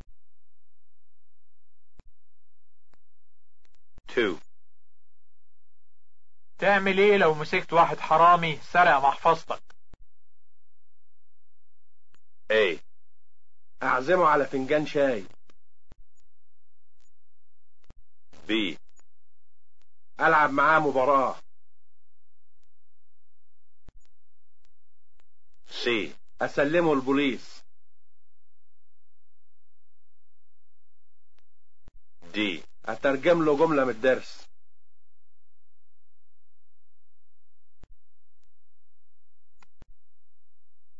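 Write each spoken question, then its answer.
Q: تعمل ايه لو مسكت واحد حرامي سرق محفظتك؟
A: C: اسلمه البوليس.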